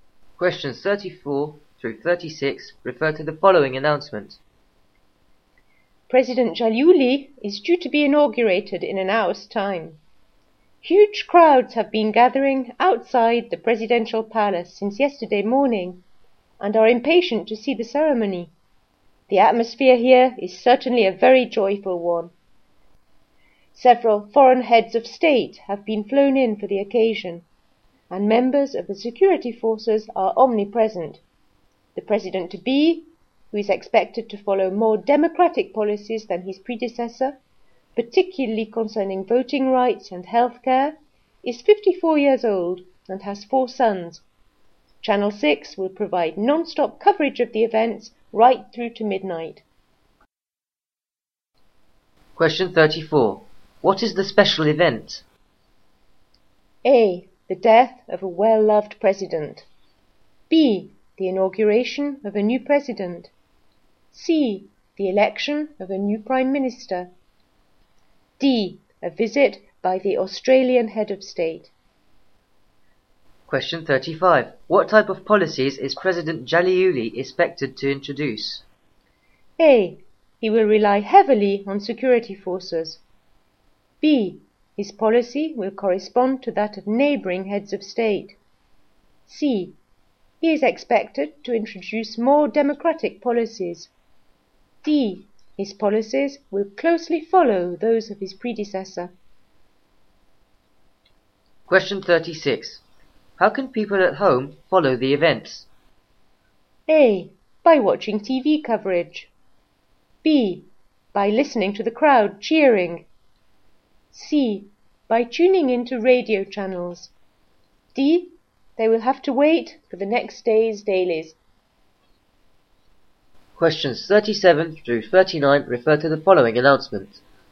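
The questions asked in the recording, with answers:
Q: What is the special event?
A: B: The inauguration of a new president.

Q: What type of policies is President Jalouli expected to introduce?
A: C: He is expected to introduce more democratic policies.

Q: How can people at home follow the events?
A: A: By watching TV coverage.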